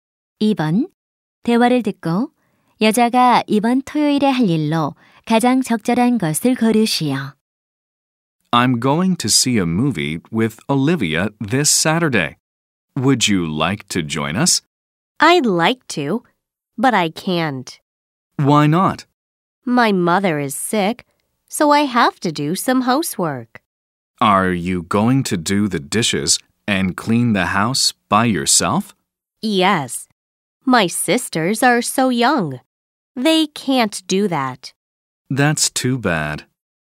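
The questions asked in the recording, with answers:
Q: 대화를 듣고 여자가 이번 토요일에 할 일로 가장 적절한 것을 고르시오.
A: 집안일 (설거지와 청소)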